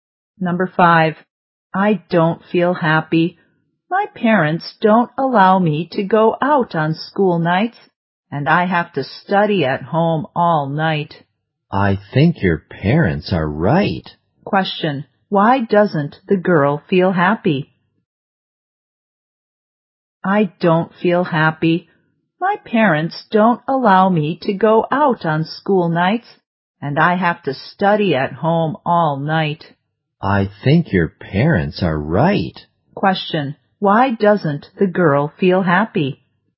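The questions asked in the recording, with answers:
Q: Why doesn't the girl feel happy?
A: Her parents don't allow her to go out on school nights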